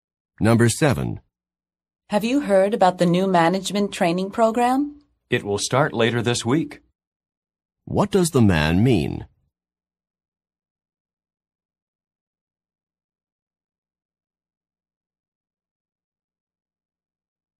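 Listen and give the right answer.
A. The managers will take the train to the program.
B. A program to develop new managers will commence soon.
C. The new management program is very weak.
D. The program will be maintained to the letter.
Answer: B. A program to develop new managers will commence soon.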